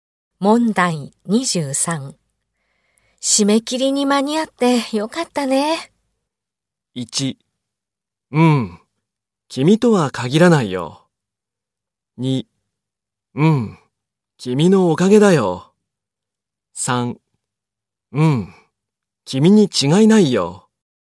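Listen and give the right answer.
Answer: 2: うん、君のおかげだよ。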